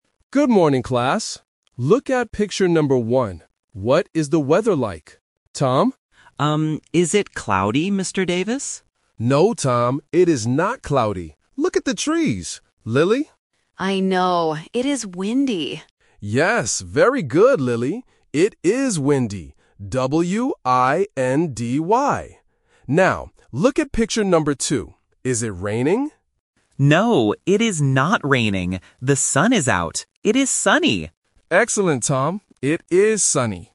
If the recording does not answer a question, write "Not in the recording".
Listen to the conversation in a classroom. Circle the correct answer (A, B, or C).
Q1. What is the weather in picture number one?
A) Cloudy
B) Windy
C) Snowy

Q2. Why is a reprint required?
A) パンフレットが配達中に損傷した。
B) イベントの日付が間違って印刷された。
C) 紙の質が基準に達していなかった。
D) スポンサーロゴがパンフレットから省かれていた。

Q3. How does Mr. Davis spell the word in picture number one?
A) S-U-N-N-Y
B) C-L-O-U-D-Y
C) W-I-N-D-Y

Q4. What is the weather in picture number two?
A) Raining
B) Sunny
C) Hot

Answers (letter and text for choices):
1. B) Windy
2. Not in the recording
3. C) W-I-N-D-Y
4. B) Sunny

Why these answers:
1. The Key: Lily answers "It is windy," and the teacher says "Yes, very good, Lily!" The Trap: Option (A) "Cloudy" is mentioned by Tom first, but the teacher clearly says "No, Tom, it is not cloudy." Not Mentioned: Option (C) "Snowy" is never mentioned in the audio.
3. The Key: After confirming the answer, the teacher spells the word out loud: "W-I-N-D-Y". The Trap: Option (A) and Option (B) are weather words from the conversation, but the teacher does not spell them.
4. The Key: Tom says, "The sun is out. It is sunny!" and the teacher says "Excellent." The Trap: Option (A) "Raining" is mentioned because the teacher asks "Is it raining?", but Tom says "No, it is not raining." Not Mentioned: Option (C) "Hot" is completely new information.

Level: A1